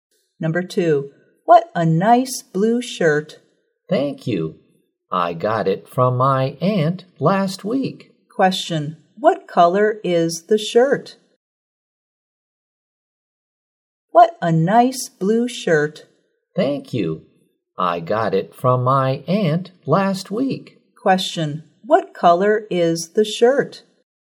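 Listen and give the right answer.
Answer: Blue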